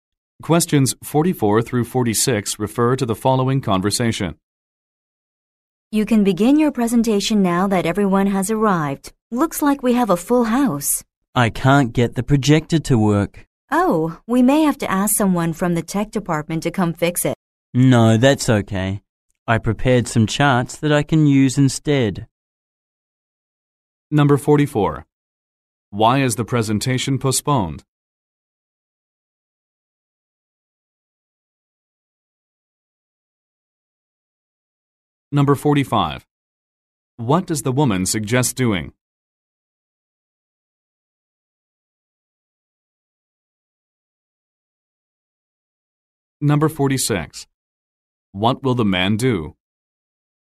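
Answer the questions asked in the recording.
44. The projector doesn't work
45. Asking someone from the tech department to fix it
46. Use the charts he prepared instead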